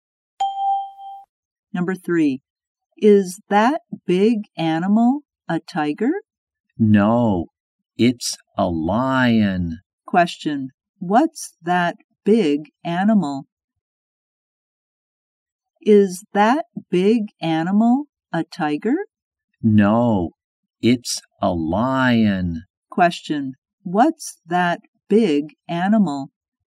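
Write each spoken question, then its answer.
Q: What's that big animal?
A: A lion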